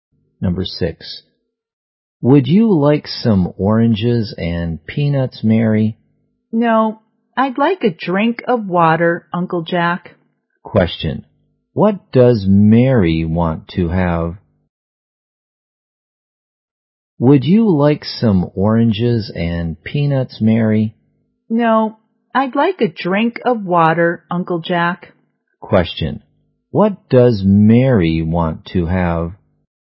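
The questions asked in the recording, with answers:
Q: What does Mary want to have?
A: A drink of water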